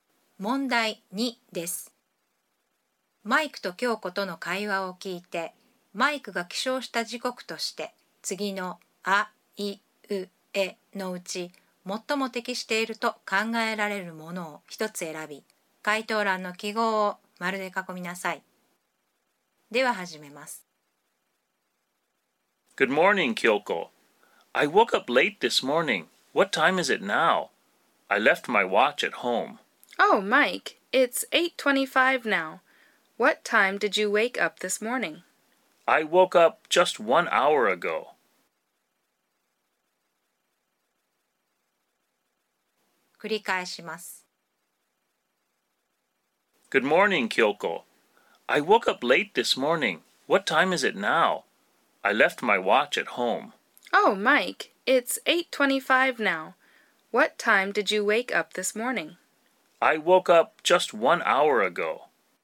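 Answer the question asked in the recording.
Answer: 7時25分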